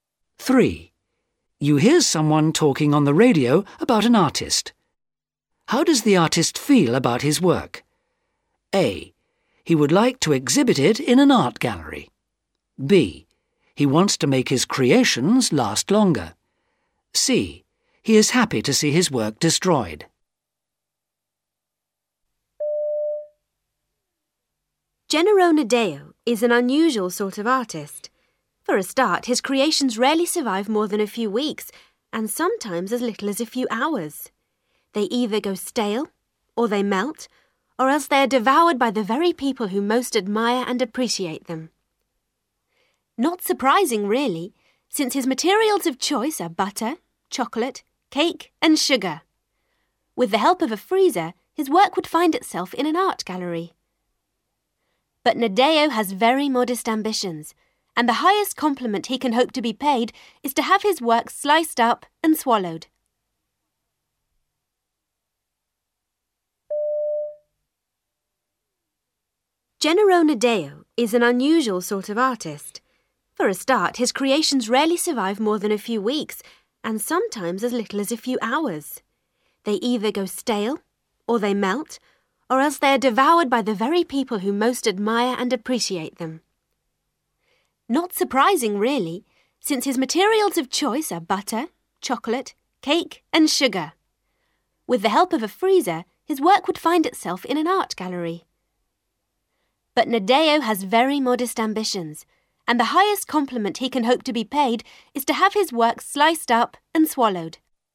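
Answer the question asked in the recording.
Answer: C: He is happy to see his work destroyed.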